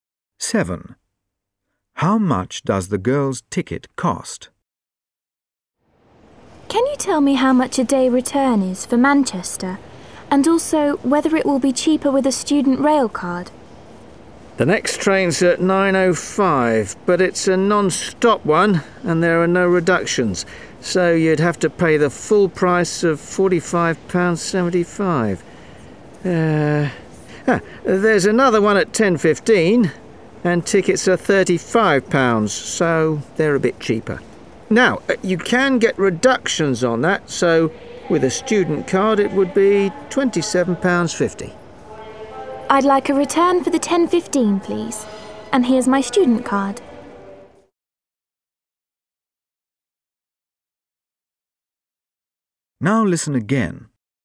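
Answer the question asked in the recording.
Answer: £27.50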